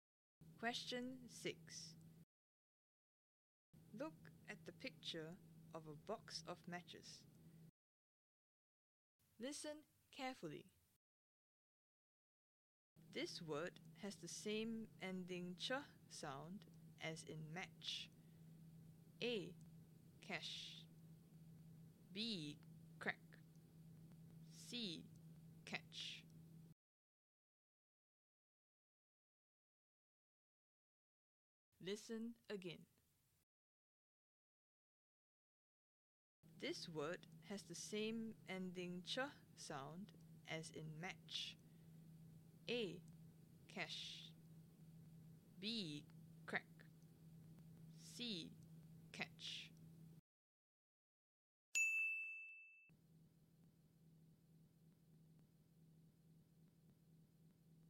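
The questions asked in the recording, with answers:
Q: This word has the same ending ch sound as in match.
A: C: Catch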